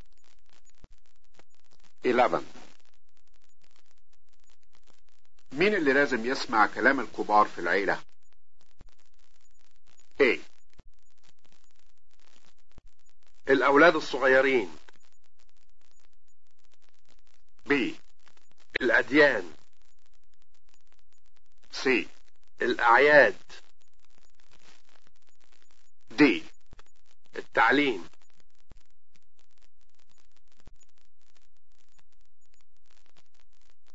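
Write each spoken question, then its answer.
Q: مين اللي لازم يسمع كلام الكبار في العيلة؟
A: A: الأولاد الصغيرين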